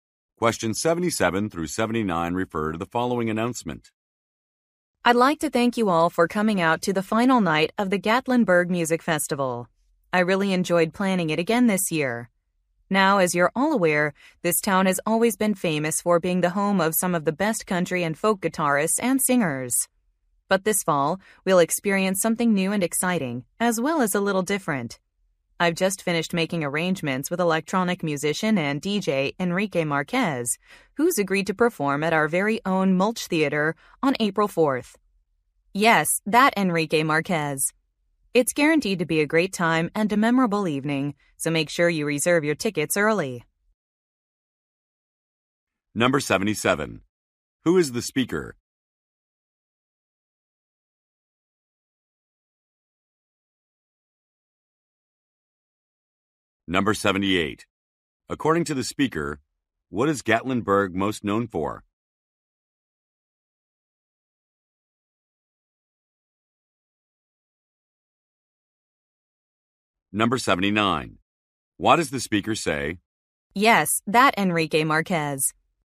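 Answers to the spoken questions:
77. The organizer of the music festival
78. Its country and folk guitarists and singers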